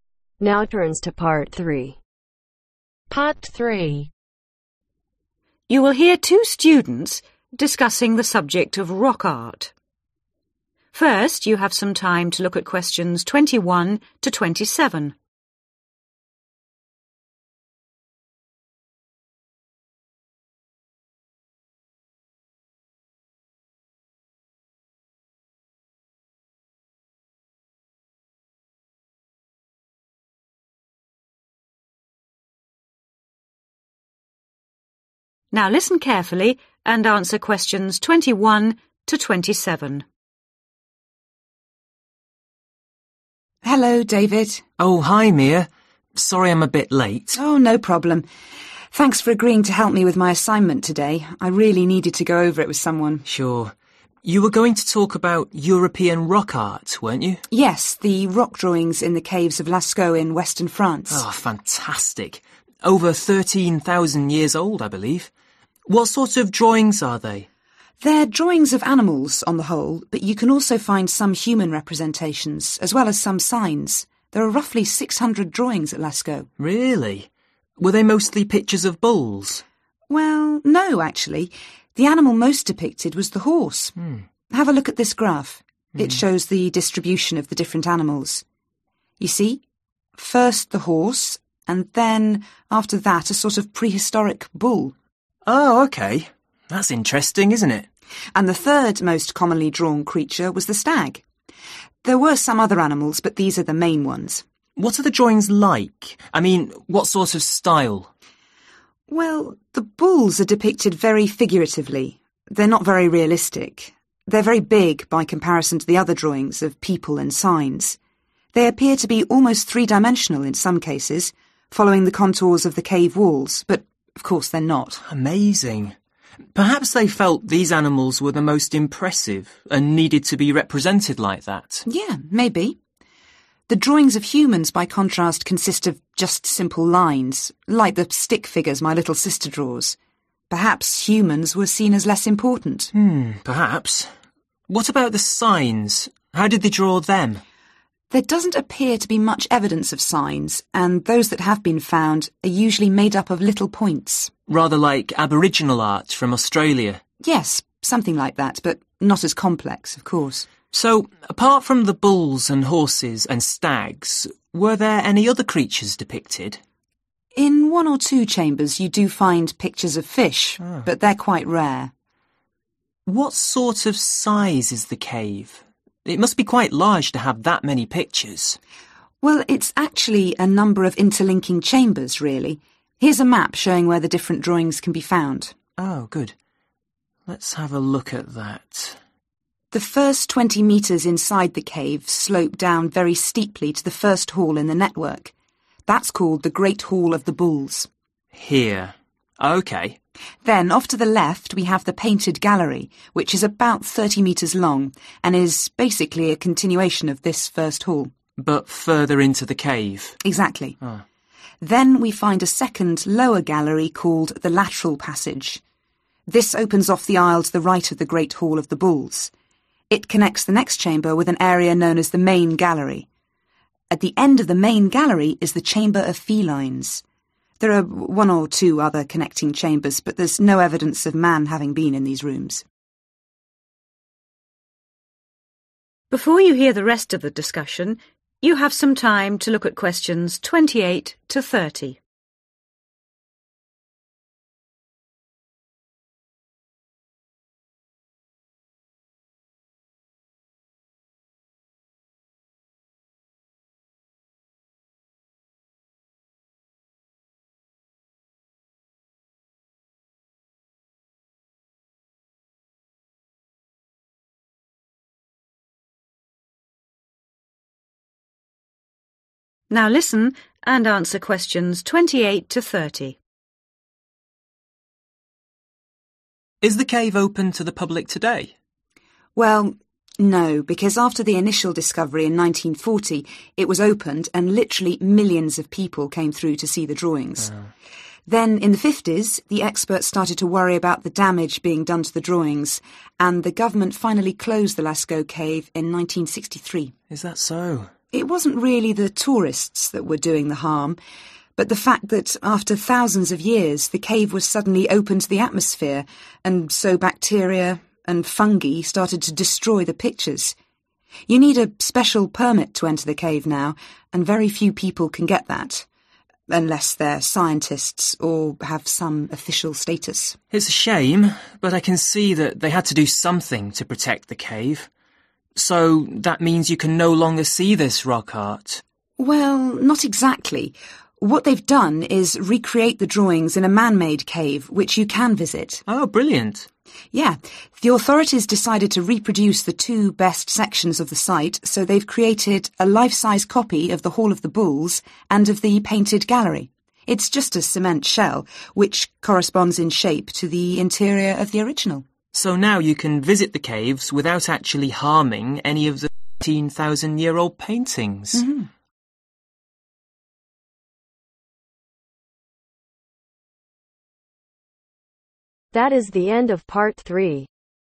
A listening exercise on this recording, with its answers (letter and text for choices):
How does the woman describe each type of drawing ? Choose your answer from the box and write the letters A-H next to questions 22-25.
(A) uncommon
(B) realistic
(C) two-dimensional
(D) childish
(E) consisting of dots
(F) complex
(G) important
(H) huge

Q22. bulls ............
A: (H) huge

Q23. humans ............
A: (D) childish

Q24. signs ............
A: (E) consisting of dots

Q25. fish ............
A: (A) uncommon

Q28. The cave was closed in 1963 because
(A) The tourists has drawn the pictures on the walls.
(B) The air was harming the rock art.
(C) So few people were visiting the site.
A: (B) The air was harming the rock art.

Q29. How does David feel about the closure of the cave ?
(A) He agrees with the decision.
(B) He thinks it was a bad idea.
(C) He has no views on the matter.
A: (A) He agrees with the decision.

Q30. How can people enjoy the drawings today ?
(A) The government has re-opened the cave.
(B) The drawings have been photographed.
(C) A replica of the cave has been built.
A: (C) A replica of the cave has been built.